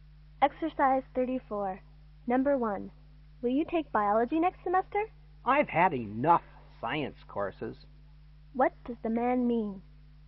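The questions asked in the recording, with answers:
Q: What does the man mean?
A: He won't take biology.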